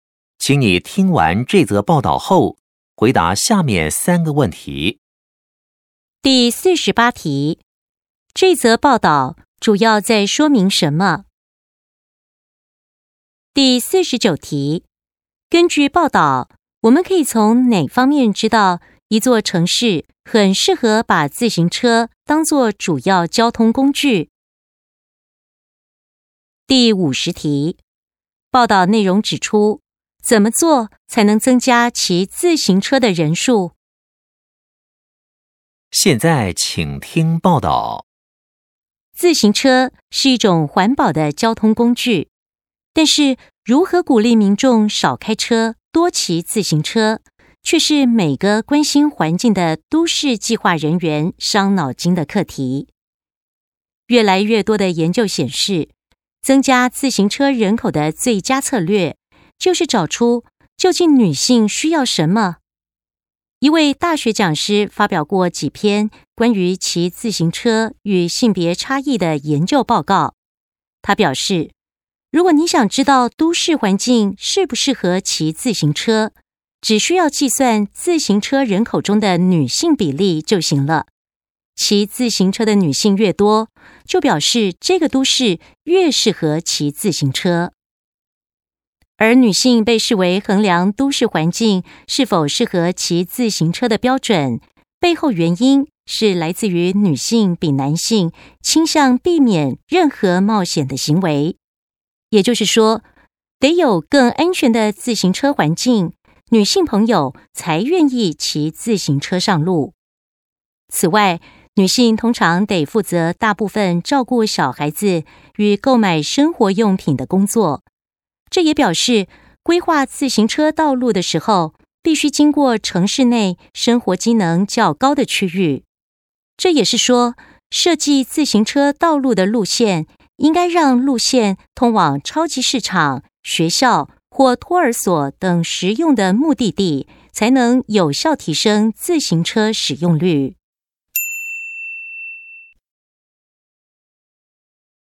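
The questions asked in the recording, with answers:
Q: 根据报道,我们可以从哪方面知道一座城市很适合把自行车当作主要交通工具?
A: 骑自行车人口中的女性比例

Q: 报道内容指出,怎么做才能增加骑自行车的人数?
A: 建设更安全的自行车环境,让车道通往超市、学校、托儿所等实用地点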